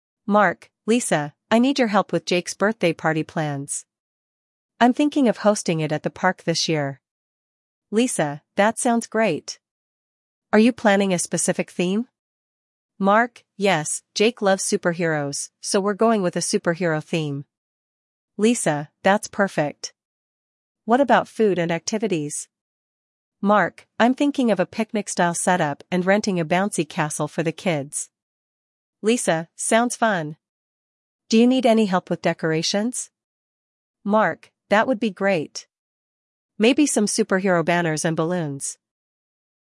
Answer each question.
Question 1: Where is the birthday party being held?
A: At the park

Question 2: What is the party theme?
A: Superheroes

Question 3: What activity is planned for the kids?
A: A bouncy castle

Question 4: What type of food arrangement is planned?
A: Picnic-style setup

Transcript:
Mark: Lisa, I need your help with Jake's birthday party plans. I'm thinking of hosting it at the park this year.
Lisa: That sounds great! Are you planning a specific theme?
Mark: Yes, Jake loves superheroes, so we're going with a superhero theme.
Lisa: That's perfect. What about food and activities?
Mark: I'm thinking of a picnic-style setup and renting a bouncy castle for the kids.
Lisa: Sounds fun! Do you need any help with decorations?
Mark: That would be great! Maybe some superhero banners and balloons.